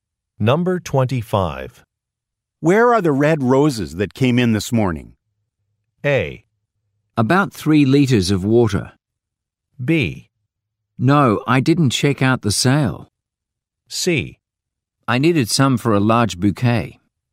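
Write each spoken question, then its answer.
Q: Where are the red roses that came in this morning?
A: C: I needed some for a large bouquet.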